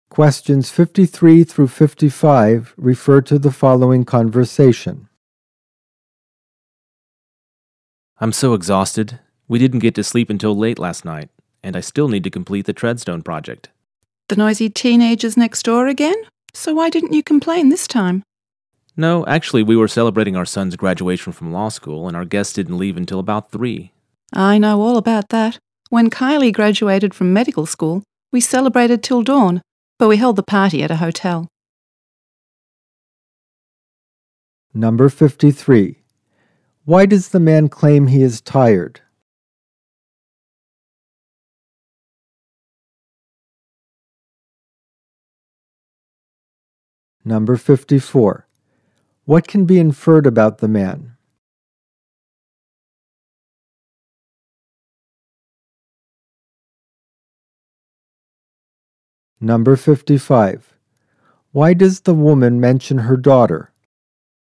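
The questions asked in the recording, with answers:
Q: Why does the man claim he is tired?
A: He stayed up late celebrating his son's law school graduation.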